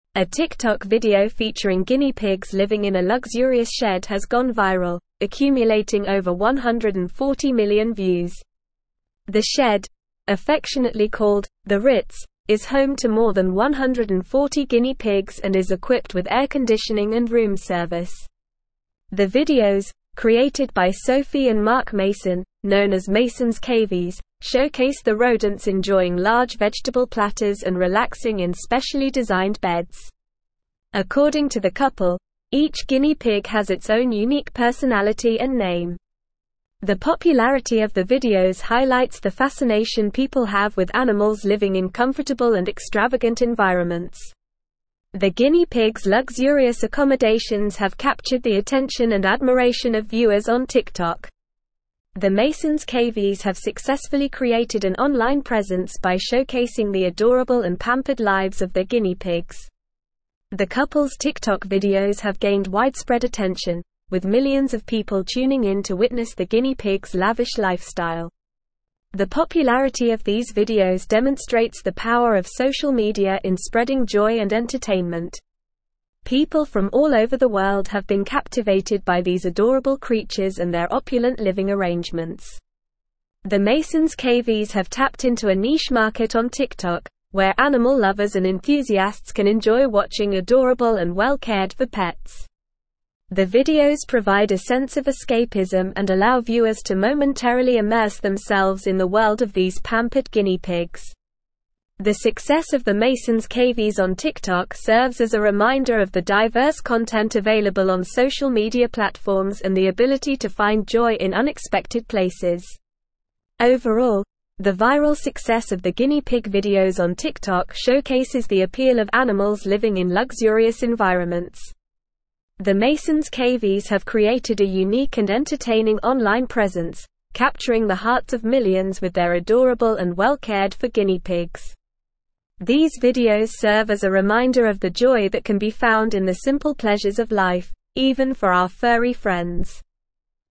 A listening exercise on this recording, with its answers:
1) The (1)______, (2)______ by (3)______ and Mark Mason, known as Masons' Cavies, showcase the rodents enjoying large vegetable platters and relaxing in specially designed beds.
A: videos

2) The (1)______, (2)______ by (3)______ and Mark Mason, known as Masons' Cavies, showcase the rodents enjoying large vegetable platters and relaxing in specially designed beds.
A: created

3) The (1)______, (2)______ by (3)______ and Mark Mason, known as Masons' Cavies, showcase the rodents enjoying large vegetable platters and relaxing in specially designed beds.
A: Sophie

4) According to the (4)______, each guinea pig has its own unique personality and name.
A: couple

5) The popularity of the videos highlights the fascination people have with animals living in (5)______ and extravagant environments.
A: comfortable

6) The guinea pigs' luxurious (6)______ have (7)______ the attention and admiration of viewers on TikTok.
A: accommodations

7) The guinea pigs' luxurious (6)______ have (7)______ the attention and admiration of viewers on TikTok.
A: captured

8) The couple's TikTok videos have gained widespread attention, with (8)______ of people tuning in to witness the guinea pigs' lavish lifestyle.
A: millions

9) The popularity of these videos demonstrates the (9)______ of social media in spreading joy and entertainment.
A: power

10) The Masons' Cavies have tapped into a (10)______ market on TikTok, where animal lovers and enthusiasts can enjoy watching adorable and well-cared-for pets.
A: niche

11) The videos provide a sense of escapism and (11)______ viewers to momentarily immerse themselves in the world of these pampered (12)______ pigs.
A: allow

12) The videos provide a sense of escapism and (11)______ viewers to momentarily immerse themselves in the world of these pampered (12)______ pigs.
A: guinea

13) The success of the Masons' Cavies on TikTok serves as a reminder of the (13)______ content available on (14)______ media platforms and the ability to find joy in unexpected places.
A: diverse

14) The success of the Masons' Cavies on TikTok serves as a reminder of the (13)______ content available on (14)______ media platforms and the ability to find joy in unexpected places.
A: social

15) The Masons' Cavies have created a unique and entertaining (15)______ presence, capturing the hearts of millions with their adorable and well-cared-for guinea pigs.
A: online

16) These videos serve as a reminder of the joy that can be (16)______ in the simple pleasures of life, even for our furry friends.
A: found

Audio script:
A TikTok video featuring guinea pigs living in a luxurious shed has gone viral, accumulating over 140 million views. The shed, affectionately called "the Ritz," is home to more than 140 guinea pigs and is equipped with air conditioning and room service. The videos, created by Sophie and Mark Mason, known as Masons' Cavies, showcase the rodents enjoying large vegetable platters and relaxing in specially designed beds. According to the couple, each guinea pig has its own unique personality and name.
The popularity of the videos highlights the fascination people have with animals living in comfortable and extravagant environments. The guinea pigs' luxurious accommodations have captured the attention and admiration of viewers on TikTok. The Masons' Cavies have successfully created an online presence by showcasing the adorable and pampered lives of their guinea pigs.
The couple's TikTok videos have gained widespread attention, with millions of people tuning in to witness the guinea pigs' lavish lifestyle. The popularity of these videos demonstrates the power of social media in spreading joy and entertainment. People from all over the world have been captivated by these adorable creatures and their opulent living arrangements.
The Masons' Cavies have tapped into a niche market on TikTok, where animal lovers and enthusiasts can enjoy watching adorable and well-cared-for pets. The videos provide a sense of escapism and allow viewers to momentarily immerse themselves in the world of these pampered guinea pigs. The success of the Masons' Cavies on TikTok serves as a reminder of the diverse content available on social media platforms and the ability to find joy in unexpected places.
Overall, the viral success of the guinea pig videos on TikTok showcases the appeal of animals living in luxurious environments. The Masons' Cavies have created a unique and entertaining online presence, capturing the hearts of millions with their adorable and well-cared-for guinea pigs. These videos serve as a reminder of the joy that can be found in the simple pleasures of life, even for our furry friends.

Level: Level 4